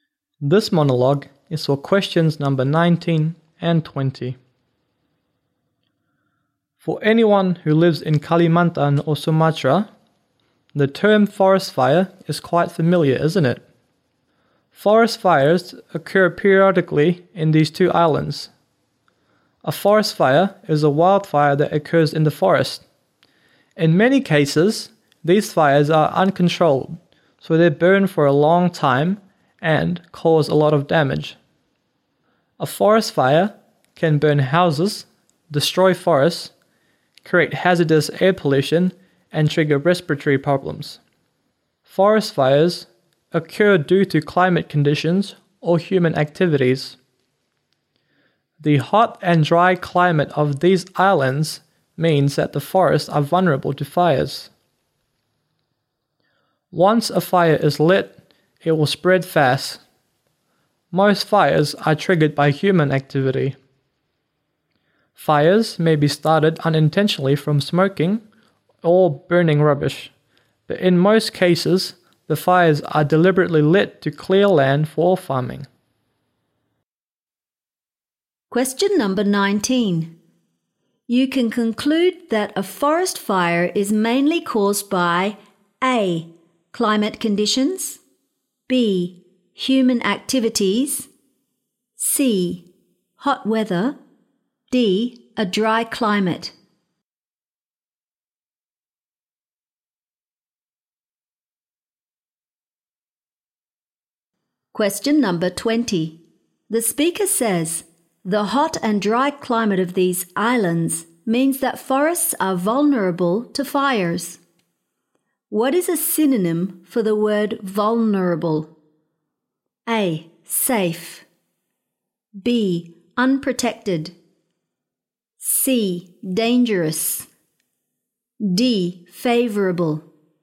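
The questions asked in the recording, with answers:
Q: You can conclude that a forest fire is mainly caused by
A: B: human activities

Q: What is a synonym for the word vulnerable?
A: B: unprotected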